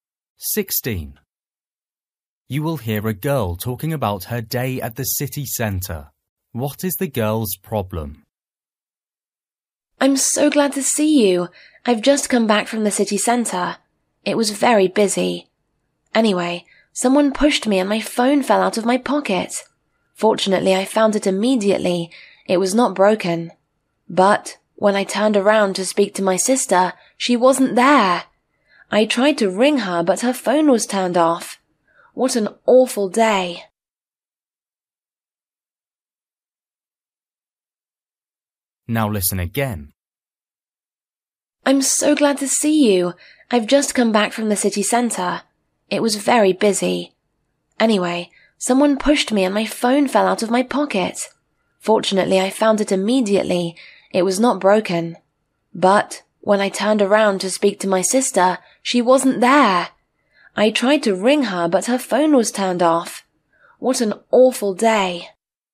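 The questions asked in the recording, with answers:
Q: What is the girl's problem?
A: She lost her sister in the city centre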